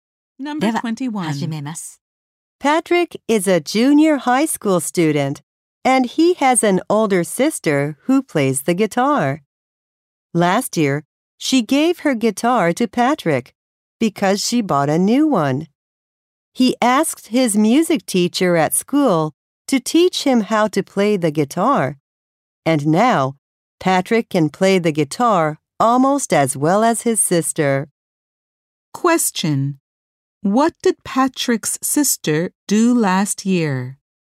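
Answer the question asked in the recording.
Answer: She gave her guitar to Patrick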